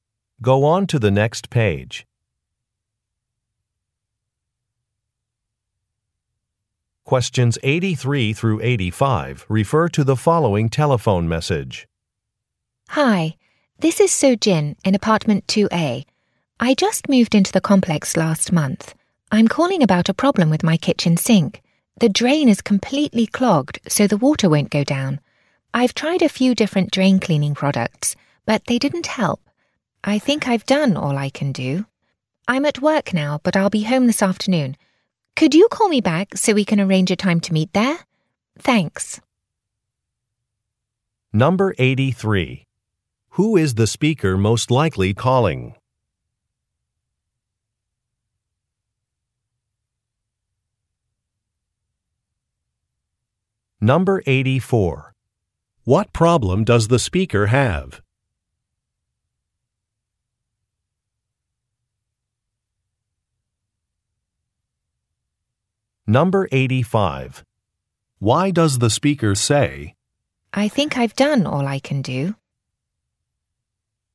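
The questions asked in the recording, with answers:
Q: Who is the speaker most likely calling?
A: The apartment building manager

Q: What problem does the speaker have?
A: Her kitchen sink drain is clogged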